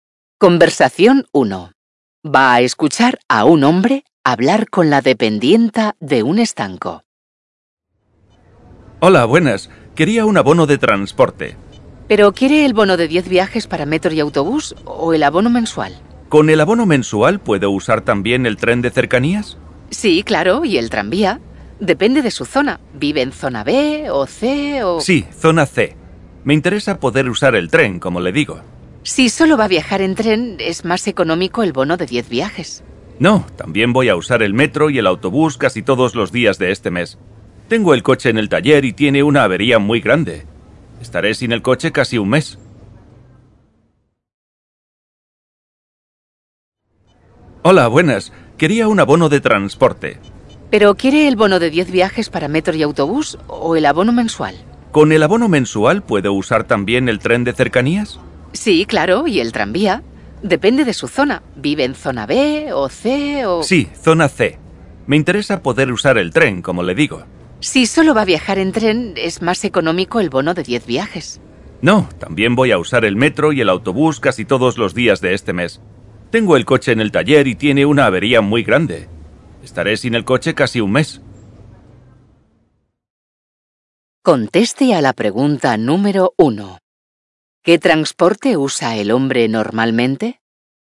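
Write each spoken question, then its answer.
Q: ¿Qué transporte usa el hombre normalmente?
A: El coche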